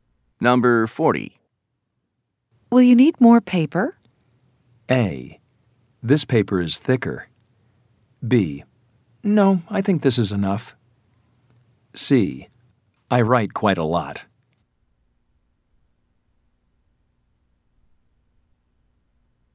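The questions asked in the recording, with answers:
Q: Will you need more paper?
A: B: No, I think this is enough.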